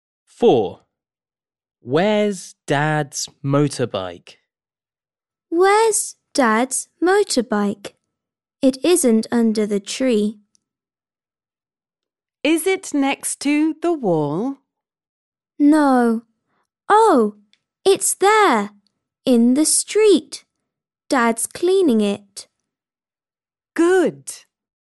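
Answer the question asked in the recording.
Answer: in the street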